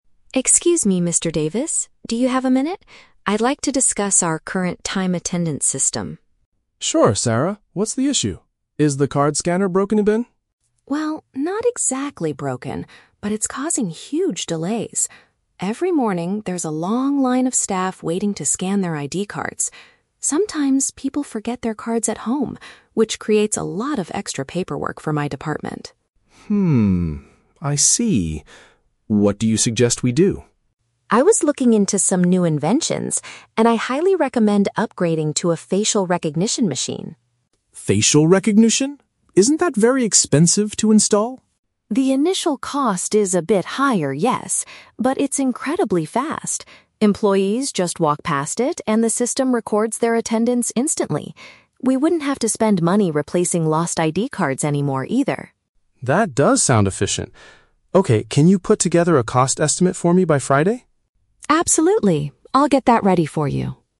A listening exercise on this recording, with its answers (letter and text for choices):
Listen to a conversation between an administrative officer and her manager. For each question, choose the correct answer (A, B, or C).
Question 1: Why does Sarah want to replace the current attendance system?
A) It requires expensive repairs too frequently.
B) It makes employees wait a long time to enter the office.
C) It does not calculate the workers' salaries correctly.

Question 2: What is Mr. Davis's initial concern about the new technology?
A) The price of setting up the equipment.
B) The privacy of the staff's personal data.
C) The time it takes to scan a person's face.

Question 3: What is Sarah expected to do next?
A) Purchase the new machine on Friday.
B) Calculate how much the new system will cost.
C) Give the employees new ID cards tomorrow.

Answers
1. B) It makes employees wait a long time to enter the office.
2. A) The price of setting up the equipment.
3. B) Calculate how much the new system will cost.

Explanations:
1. Sarah states that the current machine is "causing huge delays" and there is "a long line of staff waiting." Option (B) correctly paraphrases this situation. Option (A) is a trap; Mr. Davis asks if it is "broken", but Sarah says "not exactly broken". Option (C) is plausible for HR problems but is never mentioned.
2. Mr. Davis asks, "Isn't that very expensive to install?" Option (A) uses synonyms ("price" for "expensive", "setting up" for "install"). Option (B) sounds like a real-world concern for facial recognition but is not mentioned in the audio. Option (C) is a trap; Sarah mentions the system is "incredibly fast," which is a benefit, not the manager's concern.
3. Mr. Davis asks Sarah to "put together a cost estimate," and she agrees. Option (B) is a clear paraphrase of "cost estimate." Option (A) is a trap; Friday is the deadline for the estimate, not the day they buy the machine. Option (C) is a trap; they want to stop using ID cards, not give out new ones.

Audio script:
Sarah: Excuse me, Mr. Davis. Do you have a minute? I'd like to discuss our current time attendance system.
Mr. Davis: Sure, Sarah. What's the issue? Is the card scanner broken again?
Sarah: Well, not exactly broken, but it's causing huge delays. Every morning, there's a long line of staff waiting to scan their ID cards. Sometimes, people forget their cards at home, which creates a lot of extra paperwork for my department.
Mr. Davis: Hmm, I see. What do you suggest we do?
Sarah: I was looking into some new inventions, and I highly recommend upgrading to a facial recognition machine.
Mr. Davis: Facial recognition? Isn't that very expensive to install?
Sarah: The initial cost is a bit higher, yes. But it's incredibly fast. Employees just walk past it, and the system records their attendance instantly. We wouldn't have to spend money replacing lost ID cards anymore, either.
Mr. Davis: That does sound efficient. Okay, can you put together a cost estimate for me by Friday?